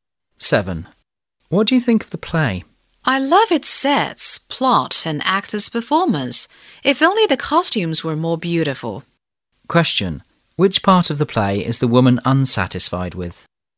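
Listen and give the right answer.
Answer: The costumes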